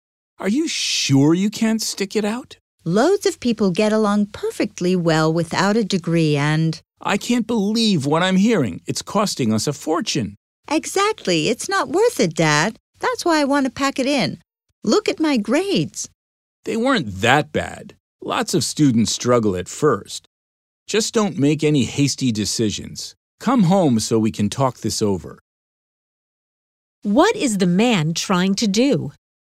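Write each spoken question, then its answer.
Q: What is the man trying to do?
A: Persuade his child not to drop out of college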